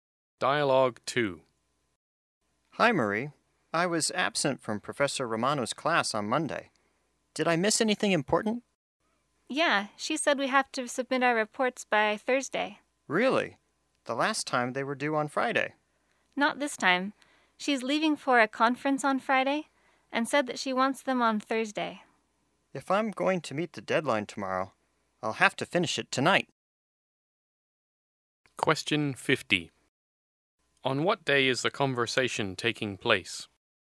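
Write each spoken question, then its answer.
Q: On what day is the conversation taking place?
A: Wednesday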